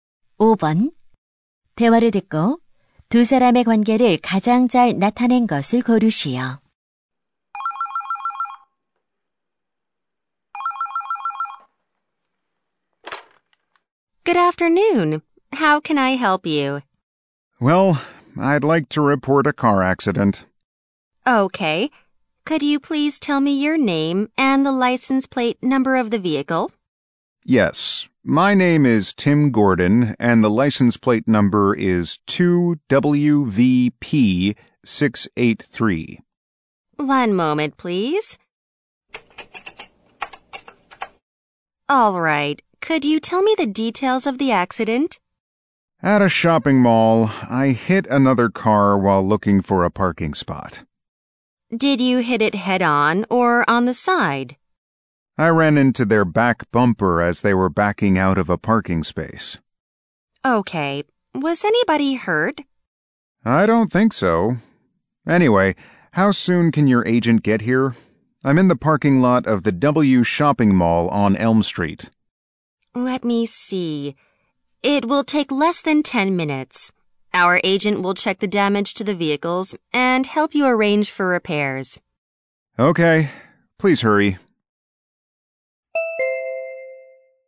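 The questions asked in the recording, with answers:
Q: 대화를 듣고 두 사람의 관계를 가장 잘 나타낸 것을 고르시오.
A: 자동차 보험회사 직원 - 고객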